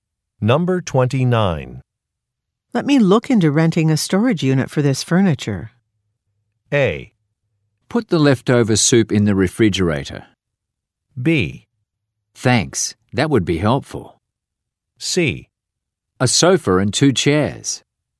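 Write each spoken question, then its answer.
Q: Let me look into renting a storage unit for this furniture.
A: B: Thanks, that would be helpful.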